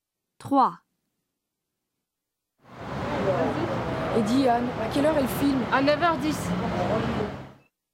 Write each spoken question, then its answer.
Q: Et dis, Anne, à quelle heure est le film?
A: 3, 9:10